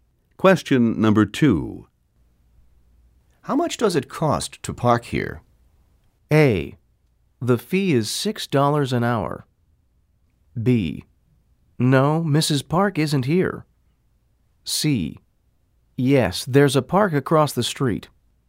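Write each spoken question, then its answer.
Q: How much does it cost to park here?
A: A: The fee is $6 an hour.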